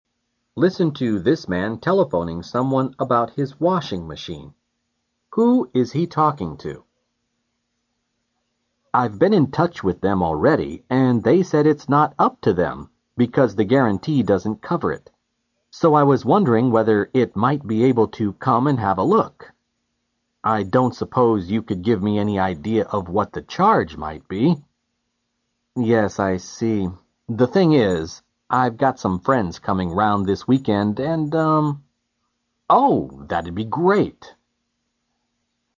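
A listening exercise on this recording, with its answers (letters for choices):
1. Who is he talking to?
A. A repair man.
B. A friend.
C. A retailer.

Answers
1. A

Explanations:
这位男士在第一句话中所说的them指厂家,因为guarantee中不包括这一项,所以他只好求助于修理工。

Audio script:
Listen to this man telephoning someone about his washing machine.
—I've been in touch with them already and they said it's not up to them because the guarantee doesn't cover it. So I was wondering whether he might be able to come and have a look. I don't suppose you could give me any idea of what the charge might be.
—Yes, I see. The thing is I've got some friends coming around this weekend and...
—Oh, that'd be great.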